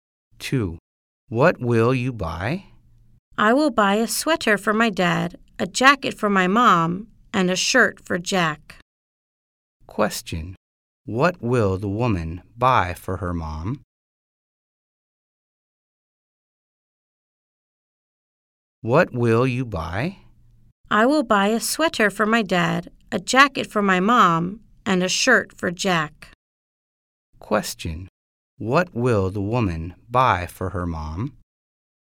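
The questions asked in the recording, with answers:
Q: What will the woman buy for her mom?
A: A jacket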